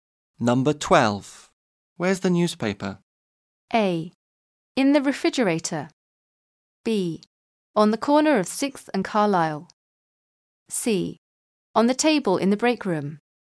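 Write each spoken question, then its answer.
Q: Where's the newspaper?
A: C: On the table in the break room.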